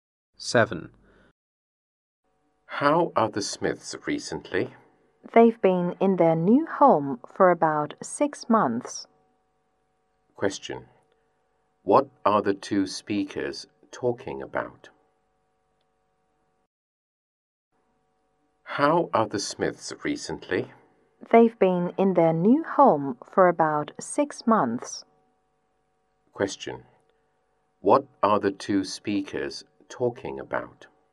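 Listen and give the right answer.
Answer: The Smiths, who have been in their new home for about 6 months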